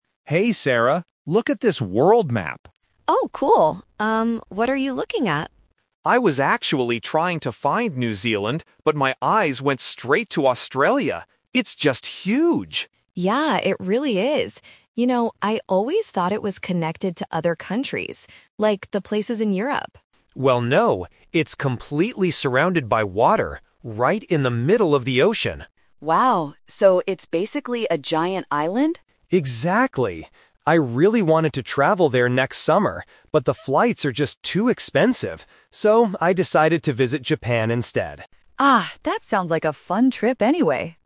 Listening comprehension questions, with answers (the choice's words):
Listen to the conversation between two friends and choose the correct answer (A, B, or C) for each question.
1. What was the man originally trying to find on the map?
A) Australia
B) New Zealand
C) Europe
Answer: New Zealand

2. What do the speakers conclude about Australia?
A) It is a very large island.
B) It is connected to Europe.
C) It is a small country in the ocean.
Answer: It is a very large island.

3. Where is the man planning to go next summer?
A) Australia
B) New Zealand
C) Japan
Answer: Japan

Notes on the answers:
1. Why B is correct: The man explicitly says, "I was actually trying to find New Zealand..." Why A is a trap: Australia is mentioned immediately after, and it becomes the main topic of the conversation, but it wasn't what he was looking for at first. Why C is wrong: Europe is just mentioned by the woman as an example of connected countries.
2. Why A is correct: The man says it's "huge" and "completely surrounded by water," and agrees when the woman calls it a "giant island." Why B is a trap: The woman says she used to think it was connected to other countries like in Europe, but the man corrects her. Why C is wrong: It is in the ocean, but the speakers emphasize that it is "huge" and "giant," not small.
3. Why C is correct: The man uses the "Twist" technique: he wanted to go to Australia, but because of expensive flights, he says, "So, I decided to visit Japan instead." Why A is a trap: He wanted to go to Australia, but changed his plans (a classic A2 distractor). Why B is wrong: New Zealand was only mentioned at the beginning when looking at the map; it was never part of his travel plans.

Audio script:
Man: Hey, Sarah, look at this world map.
Woman: Oh, cool. Um, what are you looking at?
Man: I was actually trying to find New Zealand, but my eyes went straight to Australia. It's just huge!
Woman: Yeah, it really is. You know, I always thought it was connected to other countries, like the places in Europe.
Man: Well, no. It's completely surrounded by water, right in the middle of the ocean.
Woman: Wow, so it's basically a giant island?
Man: Exactly! I really wanted to travel there next summer, but the flights are just too expensive. So, I decided to visit Japan instead.